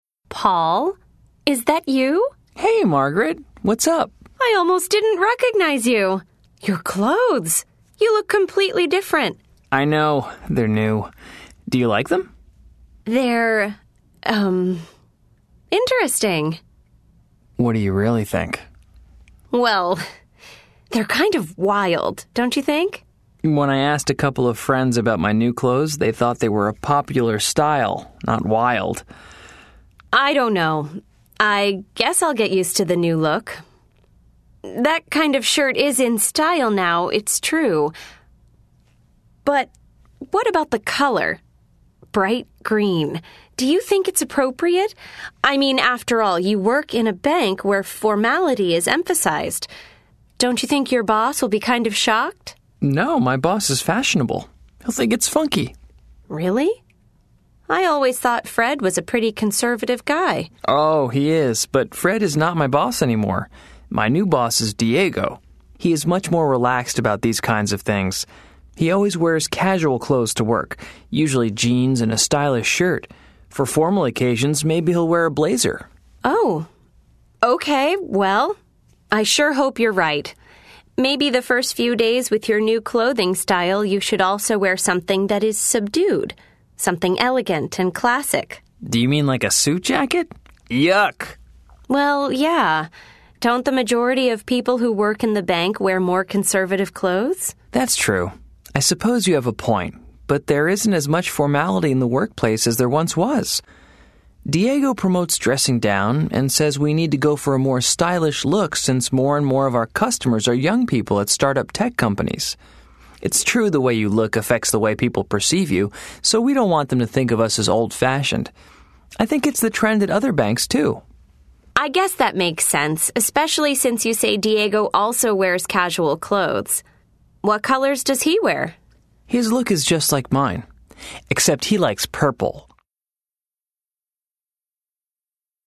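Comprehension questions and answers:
Listen to the conversation. Then choose the word or phrase that correctly completes each sentence.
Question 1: A couple of Paul's friends think his new clothes are ......................... .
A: a popular style

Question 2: Margaret thinks that Paul's clothes might .............................................. .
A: shock his boss

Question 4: Paul's new boss usually wears ........................ clothes to work.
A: casual

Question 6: According to Paul, ..................................... people who work in banks wear conservative clothes.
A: the majority of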